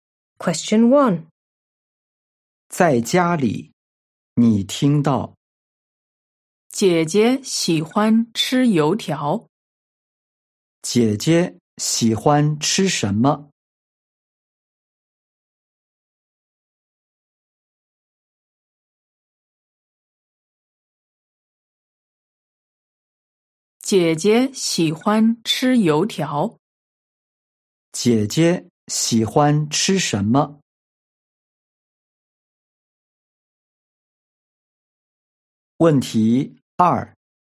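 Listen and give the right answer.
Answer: 油条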